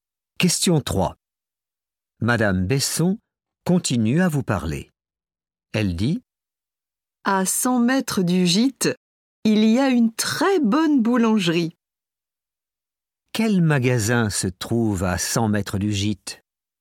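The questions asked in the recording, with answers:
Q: Quel magasin se trouve à 100 mètres du gîte?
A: une boulangerie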